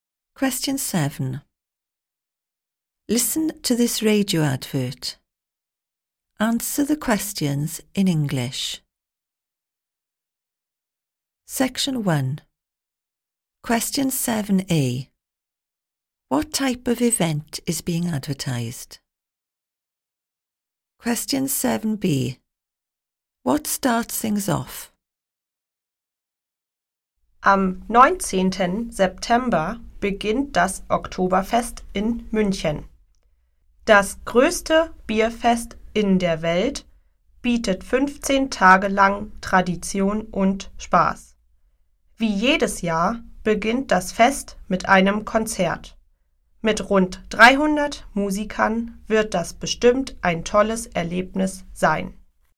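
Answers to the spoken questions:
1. A beer festival (Oktoberfest in Munich)
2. A concert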